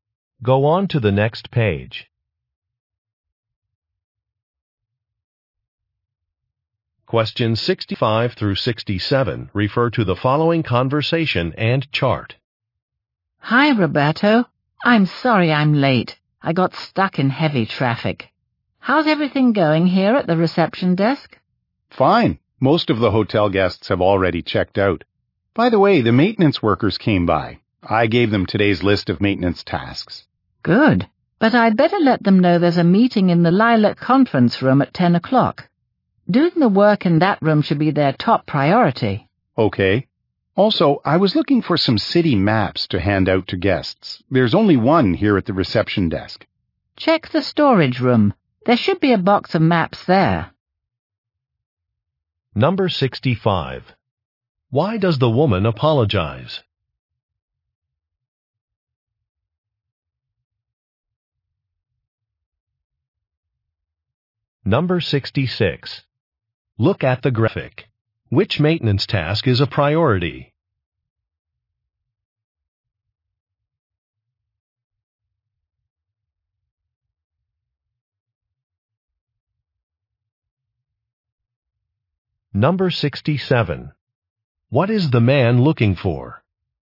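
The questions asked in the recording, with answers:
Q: Why does the woman apologize?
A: She is late because of heavy traffic

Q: What is the man looking for?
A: City maps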